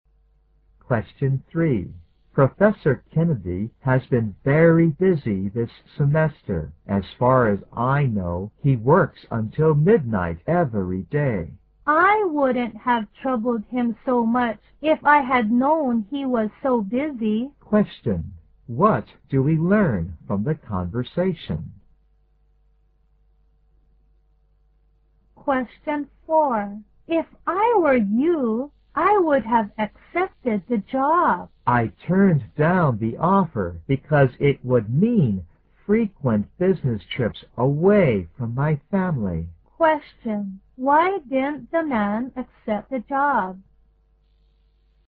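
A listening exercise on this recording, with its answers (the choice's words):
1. What do we learn from the conversation?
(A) The woman has trouble getting along with the professor.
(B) The woman regrets having taken up muchof the professor's time.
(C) The woman knows the professor has been busy.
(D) The woman knows the professor has run into trouble.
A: The woman regrets having taken up muchof the professor's time.

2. Why didn't the man accept the job?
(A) He doesn't enjoy business trips as much as he used to.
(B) He doesn't think he is capable of doing the job.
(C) He thinks the pay is too low to support his family.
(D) He wants to spend more time with his family.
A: He wants to spend more time with his family.

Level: 大学英语四级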